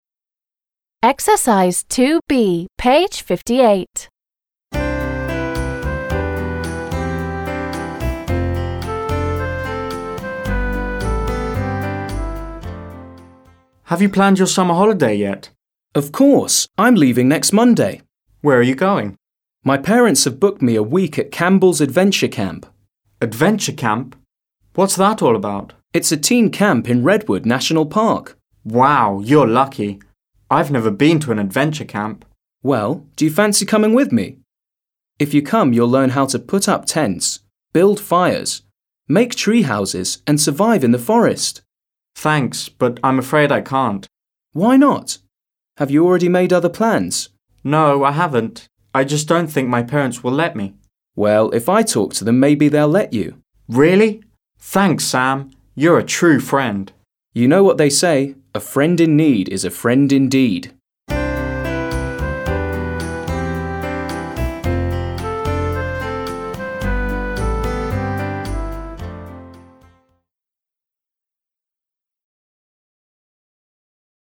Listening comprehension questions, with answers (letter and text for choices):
2. b) Read again and fill in the missing sentences (some are extra). Listen and check.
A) No, I haven't.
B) Where are you going?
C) How?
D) Of course!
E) What's that all about?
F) What time?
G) Thanks, but I'm afraid I can't.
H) That's a great idea!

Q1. John: Have you planned your summer holiday yet?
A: D) Of course!

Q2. Sam: My parents have booked me a week at Campbell's Adventure Camp.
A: B) Where are you going?

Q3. Sam: It's a teen camp in Redwood National Park.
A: E) What's that all about?

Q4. Sam: Why not? Have you already made other plans?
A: G) Thanks, but I'm afraid I can't.

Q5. Sam: Well, if I talk to them, maybe they'll let you.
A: A) No, I haven't.

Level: 7 класс